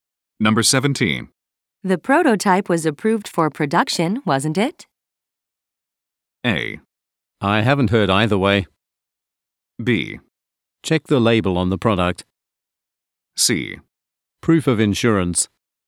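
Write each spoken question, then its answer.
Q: The prototype was approved for production, wasn't it?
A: A: I haven't heard either way.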